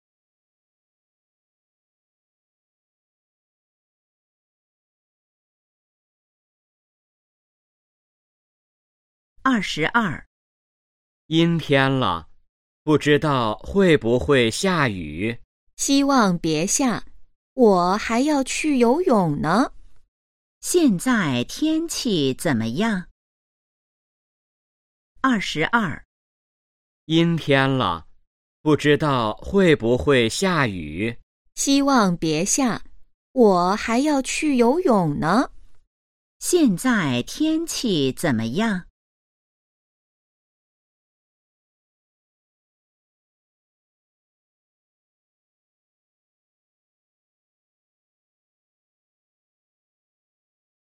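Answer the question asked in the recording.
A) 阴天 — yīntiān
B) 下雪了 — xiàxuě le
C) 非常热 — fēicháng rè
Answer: A) 阴天 — yīntiān

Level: HSK2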